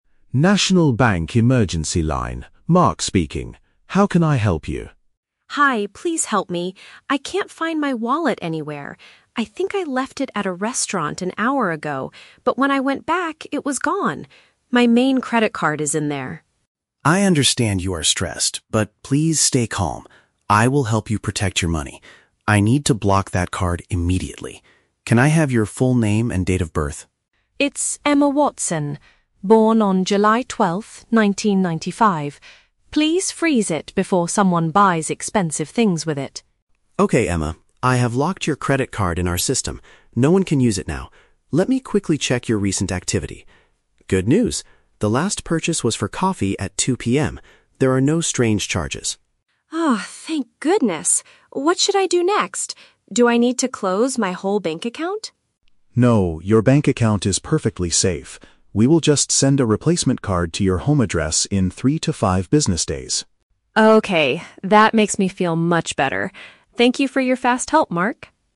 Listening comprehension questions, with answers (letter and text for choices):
Listen to a phone conversation between a customer and a bank emergency operator. For each question, choose the correct answer (A, B, or C).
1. How did the customer lose her credit card?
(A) Someone secretly stole it from her bag while she was walking.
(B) She accidentally forgot her wallet at a dining place.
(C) She dropped it on the floor while paying for her coffee.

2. What is the good news that the agent shares with Emma?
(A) The restaurant manager found her wallet and kept it safe.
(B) Her brand new credit card will arrive at her house tomorrow.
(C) Nobody has used her lost card to buy anything yet.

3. What will happen to Emma's finances now?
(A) Her entire banking profile will be permanently closed.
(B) She will receive a new piece of plastic in the mail soon.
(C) She has to visit the bank in person to unlock her old card.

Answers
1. (B) She accidentally forgot her wallet at a dining place.
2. (C) Nobody has used her lost card to buy anything yet.
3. (B) She will receive a new piece of plastic in the mail soon.

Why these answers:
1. Emma says, "I think I left it at a restaurant an hour ago" (forgot her wallet at a dining place). Option (A) is a trap; she lost it, but she doesn't mention a pickpocket stealing it from her bag while walking. Option (C) is a trap; coffee is mentioned later as her last purchase, not where she dropped the card.
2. Mark checks her account and says, "There are no strange charges," meaning her money is safe and nobody has used it to buy anything. Option (A) is a trap; she actually went back to the restaurant and "it was gone." Option (B) is a trap; her new card will arrive in "three to five business days," not tomorrow.
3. Mark assures her that they will "send a replacement card to your home address in three to five business days" (a new piece of plastic in the mail soon). Option (A) is a trap; Emma asks if she needs to close her whole bank account, and Mark explicitly says "No." Option (C) is a trap; the old card is "locked" permanently, not going to be unlocked.

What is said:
Mark: National Bank Emergency Line, Mark speaking. How can I help you?
Emma: Hi, please help me! I can't find my wallet anywhere. I think I left it at a restaurant an hour ago, but when I went back, it was gone. My main credit card is in there.
Mark: I understand you are stressed, but please stay calm. I will help you protect your money. I need to block that card immediately. Can I have your full name and date of birth?
Emma: It's Emma Watson. Born on July 12th, 1995. Please freeze it before someone buys expensive things with it.
Mark: Okay, Emma. I have locked your credit card in our system. No one can use it now. Let me quickly check your recent activity... Good news. The last purchase was for coffee at 2 PM. There are no strange charges.
Emma: Oh, thank goodness. What should I do next? Do I need to close my whole bank account?
Mark: No, your bank account is perfectly safe. We will just send a replacement card to your home address in three to five business days.